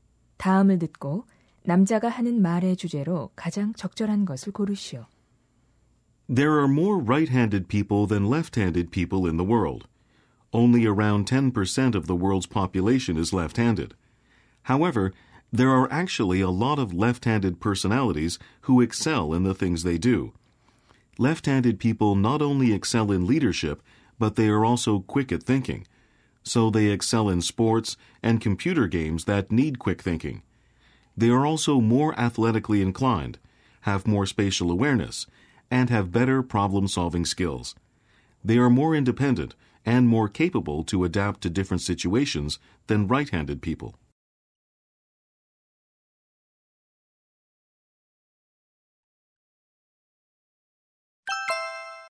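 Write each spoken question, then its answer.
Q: 다음을 듣고 남자가 하는 말의 주제로 가장 적절한 것을 고르시오.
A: 왼손잡이의 장점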